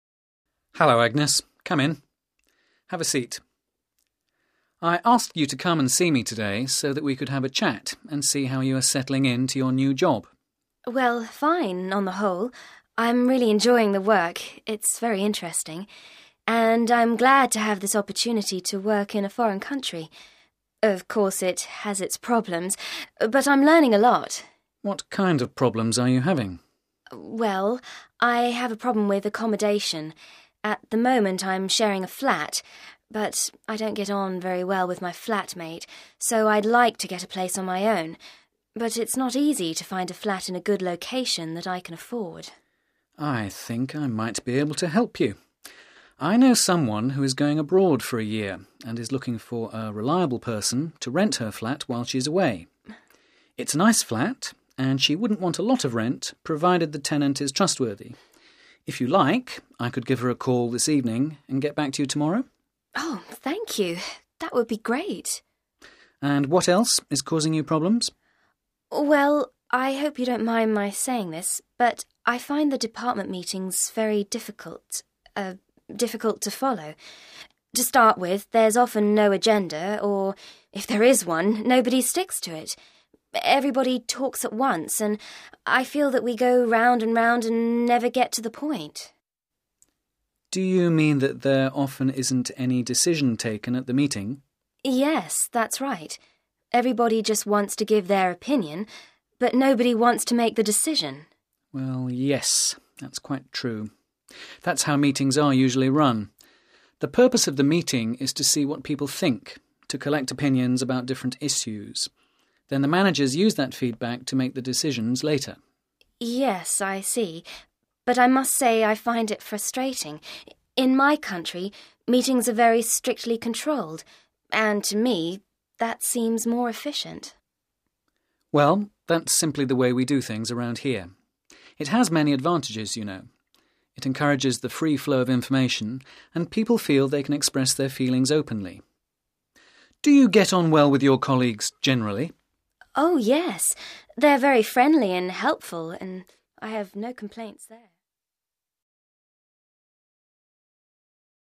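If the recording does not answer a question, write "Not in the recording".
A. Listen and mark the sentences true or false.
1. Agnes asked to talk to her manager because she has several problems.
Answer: false

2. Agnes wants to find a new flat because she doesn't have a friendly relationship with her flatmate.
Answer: true

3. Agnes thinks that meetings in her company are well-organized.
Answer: false

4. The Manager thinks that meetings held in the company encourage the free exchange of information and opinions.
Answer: true

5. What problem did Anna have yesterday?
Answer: Not in the recording

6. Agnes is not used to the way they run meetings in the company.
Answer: true

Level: B2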